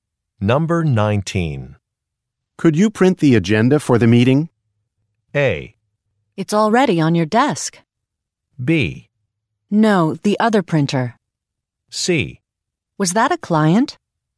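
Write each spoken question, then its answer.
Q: Could you print the agenda for the meeting?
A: A: It's already on your desk.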